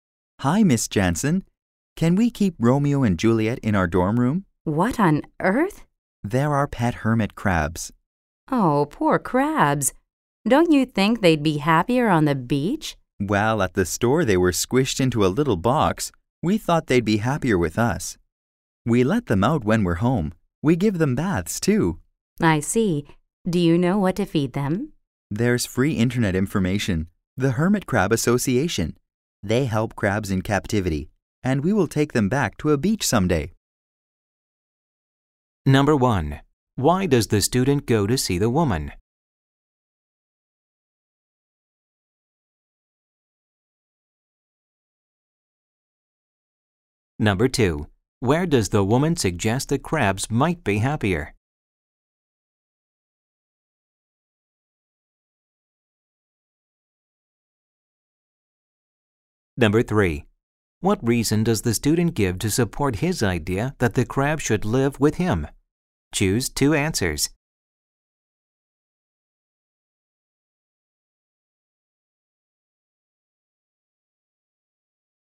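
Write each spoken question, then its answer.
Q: Why does the student go to see the woman?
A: To ask if they can keep their pet hermit crabs in their dorm room

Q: Where does the woman suggest the crabs might be happier?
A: On the beach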